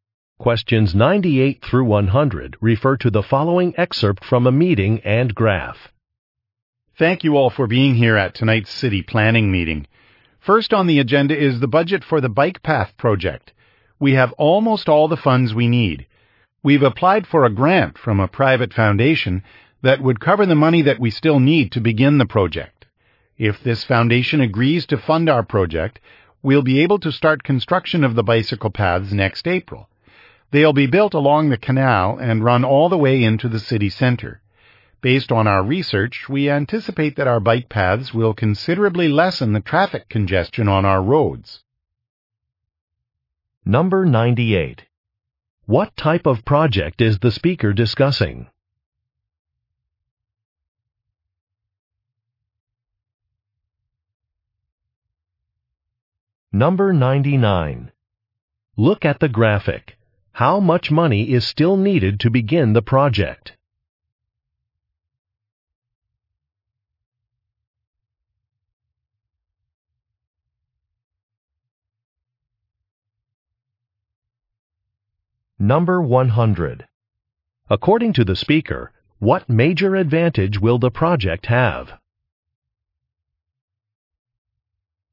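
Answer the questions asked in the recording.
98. Building bike paths
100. Less traffic congestion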